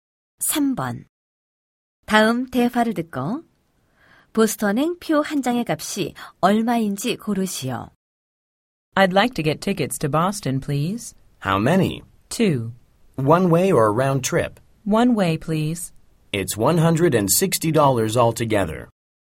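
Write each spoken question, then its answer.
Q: 다음 대화를 듣고 보스턴행 표 한 장의 값이 얼마인지 고르시오.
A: 80달러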